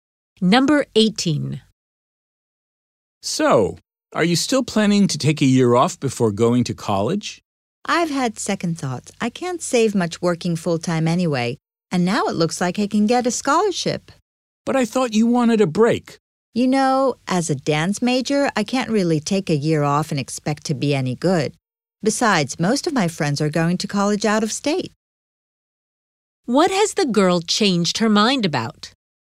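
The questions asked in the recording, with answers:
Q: What has the girl changed her mind about?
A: Taking a year off before college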